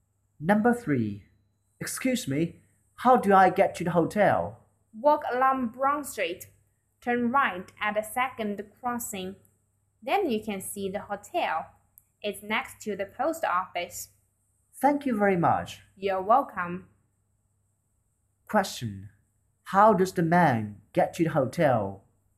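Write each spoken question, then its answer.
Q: How does the man get to the hotel?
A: Walk along Brown Street and turn right at the second crossing.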